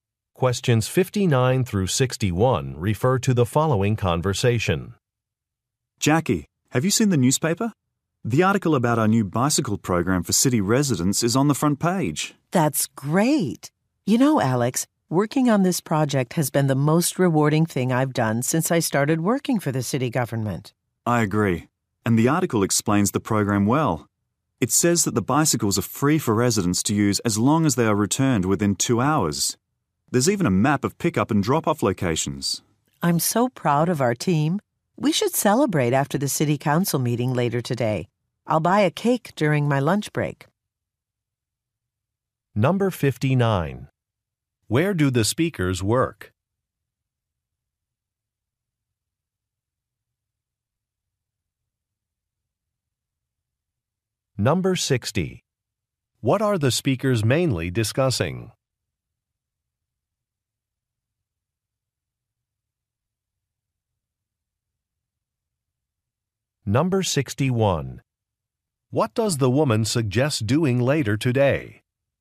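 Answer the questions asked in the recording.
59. At the city government
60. A newspaper article about the city bicycle program
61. Celebrating after the city council meeting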